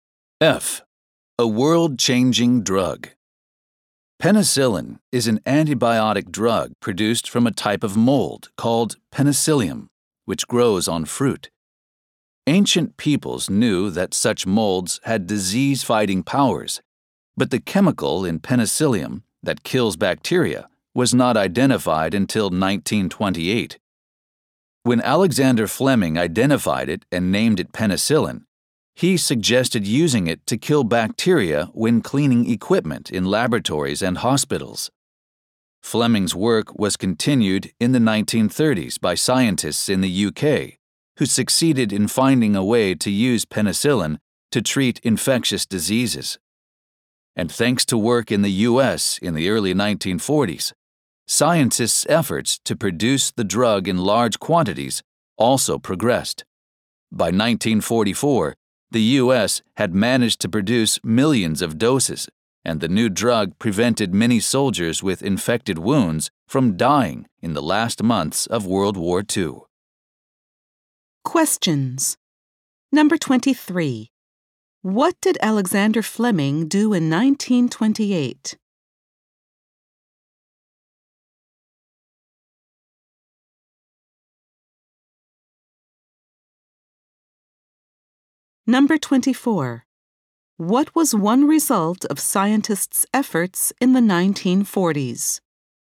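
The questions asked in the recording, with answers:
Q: What did Alexander Fleming do in 1928?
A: He identified and named penicillin, the chemical in penicillium that kills bacteria.

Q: What was one result of scientists' efforts in the 1940s?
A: Penicillin was mass-produced, and it saved many soldiers with infected wounds in World War II.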